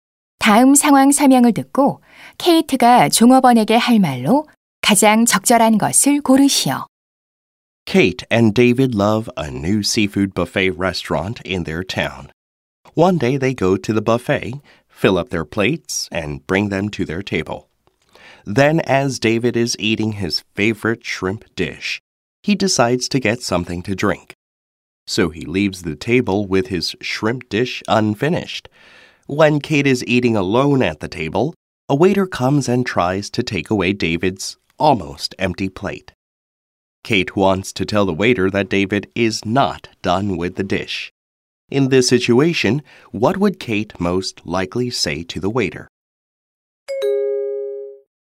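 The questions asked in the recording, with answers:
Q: In this situation, what would Kate most likely say to the waiter?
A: Please don't take that plate; he's not finished with it yet.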